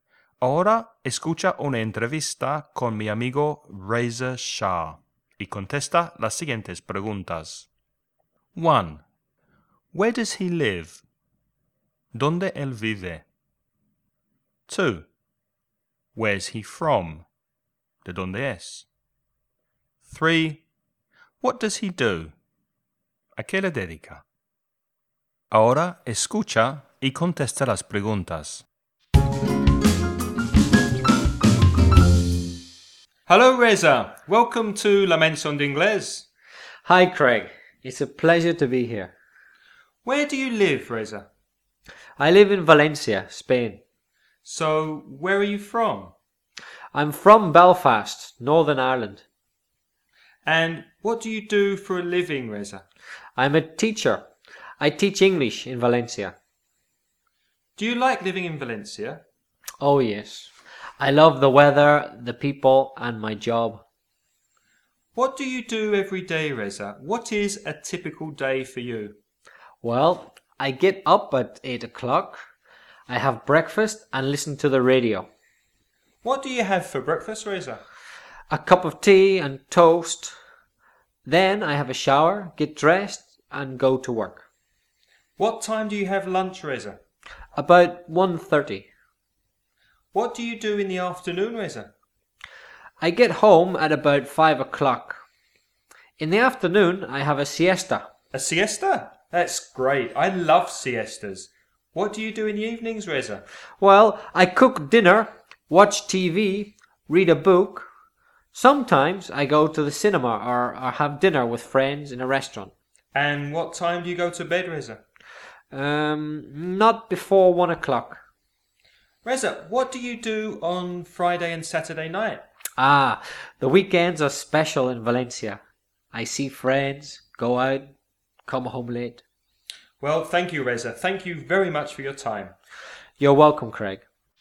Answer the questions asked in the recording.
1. He lives in Valencia.
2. He's from Belfast, Northern Ireland.
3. He's an English teacher.